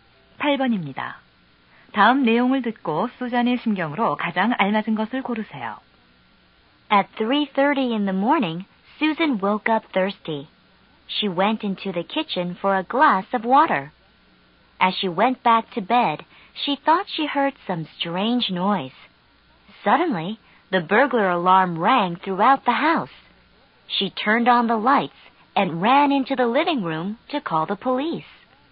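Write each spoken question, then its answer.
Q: 다음 내용을 듣고 수잔의 심경으로 가장 알맞은 것을 고르세요.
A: 겁에 질림(무서움)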